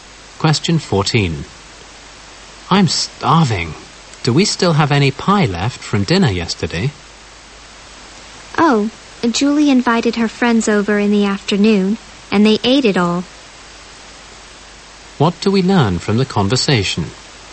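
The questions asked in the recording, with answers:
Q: What do we learn from the conversation?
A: Julie's friends ate all the pie.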